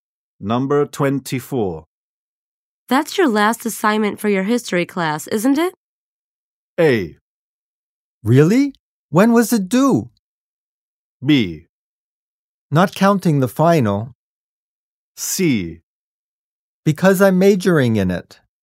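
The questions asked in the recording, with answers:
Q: That's your last assignment for your history class, isn't it?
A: B: Not counting the final.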